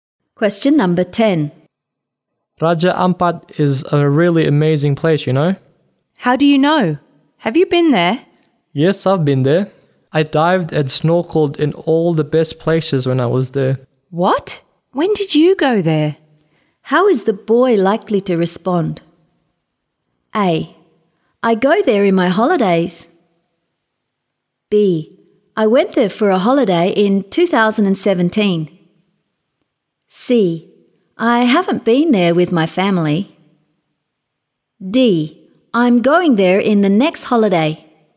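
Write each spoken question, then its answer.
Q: How is the boy likely to respond?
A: B: I went there for a holiday in 2017.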